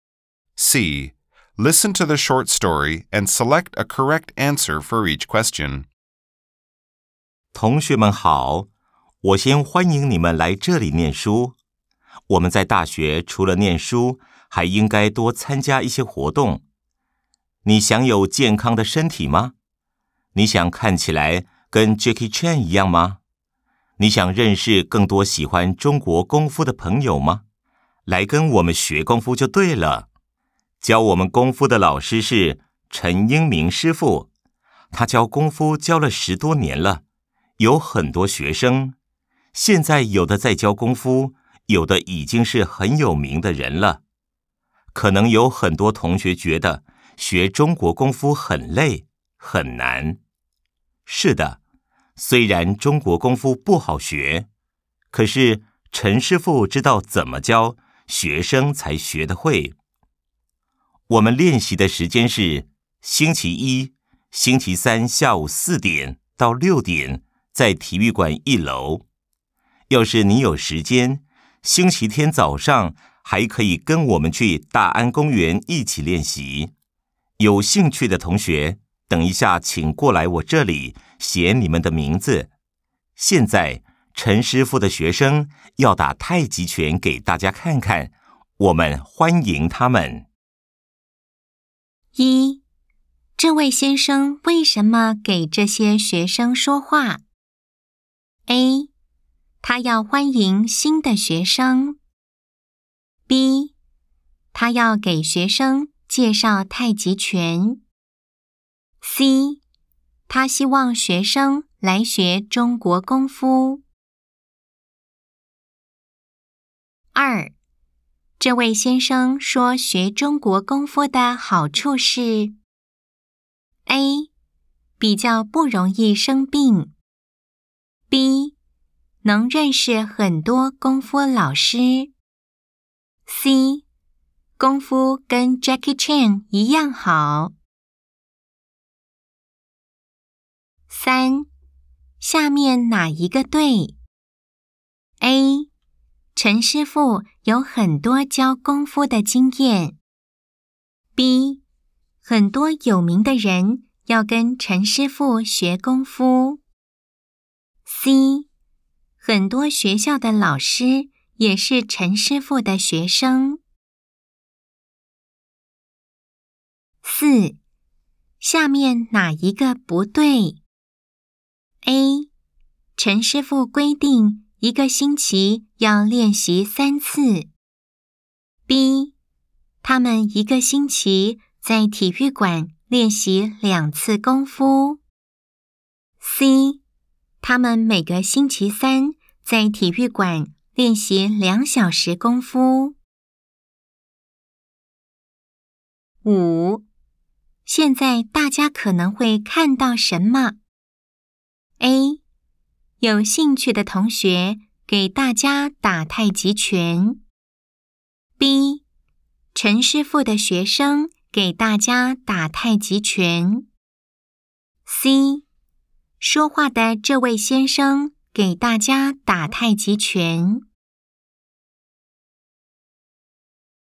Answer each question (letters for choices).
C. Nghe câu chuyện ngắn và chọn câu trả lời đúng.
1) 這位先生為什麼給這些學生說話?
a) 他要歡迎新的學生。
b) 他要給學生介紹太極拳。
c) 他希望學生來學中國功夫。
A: c

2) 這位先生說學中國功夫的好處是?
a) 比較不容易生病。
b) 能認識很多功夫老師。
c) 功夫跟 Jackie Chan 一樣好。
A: a

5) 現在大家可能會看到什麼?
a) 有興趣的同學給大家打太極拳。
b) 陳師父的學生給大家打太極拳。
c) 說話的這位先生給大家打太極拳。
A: b